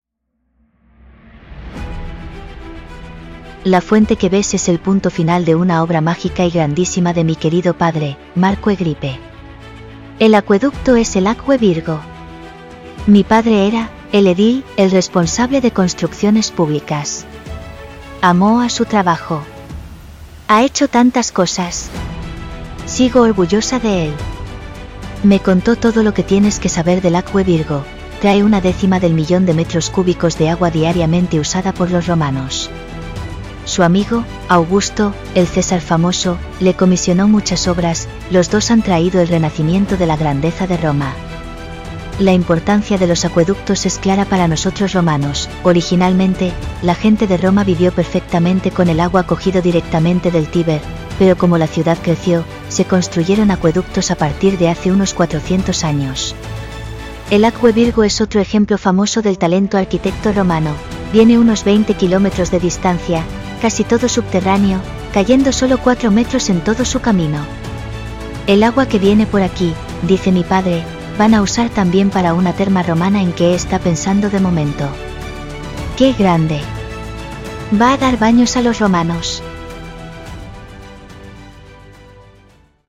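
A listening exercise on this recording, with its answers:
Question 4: ¿Quién era el edil (responsable de construcciones públicas) en Roma en el siglo 1 a.C. quien construyó el Acqua Virgo, el acueducto de la fuente?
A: Marco Agripa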